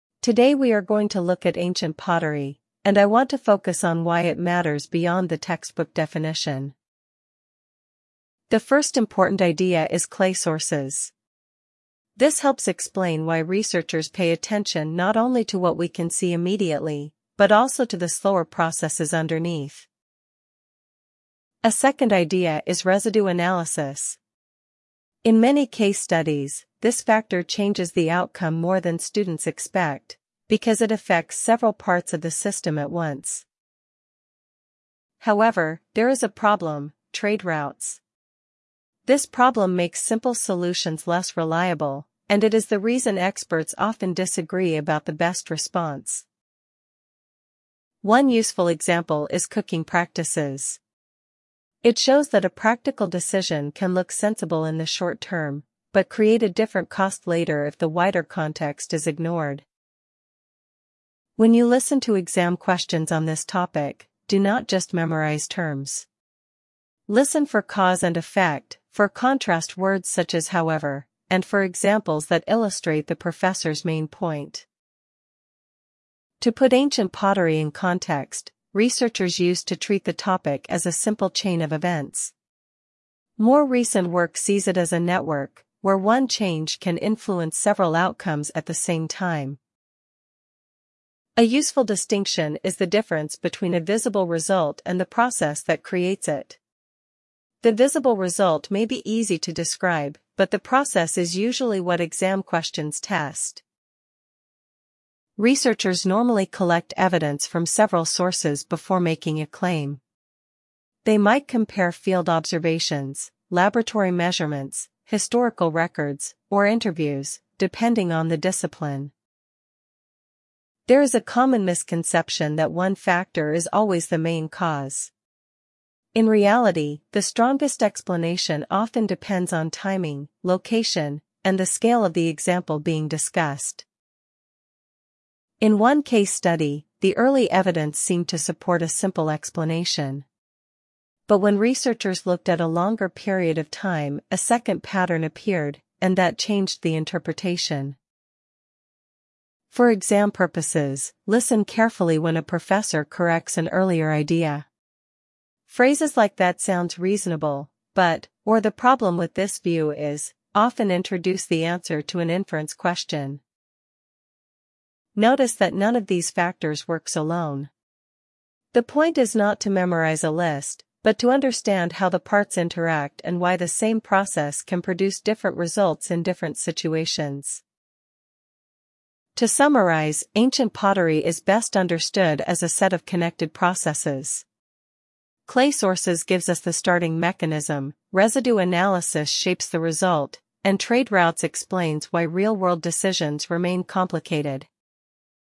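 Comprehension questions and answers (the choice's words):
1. What is the lecture mainly about?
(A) Ancient pottery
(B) A student housing policy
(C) A library rule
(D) A language placement test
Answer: Ancient pottery

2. What is the first important idea?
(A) Clay sources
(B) Residue analysis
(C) Trade routes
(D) Cooking practices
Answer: Clay sources

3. What is the second idea discussed?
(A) Cooking practices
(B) Campus funding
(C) Residue analysis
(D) Exam registration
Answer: Residue analysis

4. Why is the issue complicated?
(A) It makes simple solutions less reliable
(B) It has no examples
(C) It is only historical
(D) It is unrelated to practice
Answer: It makes simple solutions less reliable

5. What does the example show?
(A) Short-term decisions can have later costs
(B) Definitions are never useful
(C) Students should avoid examples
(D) The topic is solved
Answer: Short-term decisions can have later costs

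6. What should listeners pay attention to in exam questions?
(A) Only names and dates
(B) Cause, effect, contrast words, and examples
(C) Spelling rules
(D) The professor's accent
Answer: Cause, effect, contrast words, and examples

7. How does the professor summarise the topic?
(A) As one simple rule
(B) As connected processes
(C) As a personal opinion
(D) As an administrative problem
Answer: As connected processes

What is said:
Today we are going to look at ancient pottery, and I want to focus on why it matters beyond the textbook definition.
The first important idea is clay sources. This helps explain why researchers pay attention not only to what we can see immediately, but also to the slower processes underneath.
A second idea is residue analysis. In many case studies, this factor changes the outcome more than students expect, because it affects several parts of the system at once.
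However, there is a problem: trade routes. This problem makes simple solutions less reliable, and it is the reason experts often disagree about the best response.
One useful example is cooking practices. It shows that a practical decision can look sensible in the short term, but create a different cost later if the wider context is ignored.
When you listen to exam questions on this topic, do not just memorise terms. Listen for cause and effect, for contrast words such as however, and for examples that illustrate the professor's main point.
To put ancient pottery in context, researchers used to treat the topic as a simple chain of events. More recent work sees it as a network, where one change can influence several outcomes at the same time.
A useful distinction is the difference between a visible result and the process that creates it. The visible result may be easy to describe, but the process is usually what exam questions test.
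Researchers normally collect evidence from several sources before making a claim. They might compare field observations, laboratory measurements, historical records, or interviews, depending on the discipline.
There is a common misconception that one factor is always the main cause. In reality, the strongest explanation often depends on timing, location, and the scale of the example being discussed.
In one case study, the early evidence seemed to support a simple explanation. But when researchers looked at a longer period of time, a second pattern appeared, and that changed the interpretation.
For exam purposes, listen carefully when a professor corrects an earlier idea. Phrases like that sounds reasonable, but, or the problem with this view is, often introduce the answer to an inference question.
Notice that none of these factors works alone. The point is not to memorise a list, but to understand how the parts interact and why the same process can produce different results in different situations.
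To summarise, ancient pottery is best understood as a set of connected processes. Clay sources gives us the starting mechanism, residue analysis shapes the result, and trade routes explains why real-world decisions remain complicated.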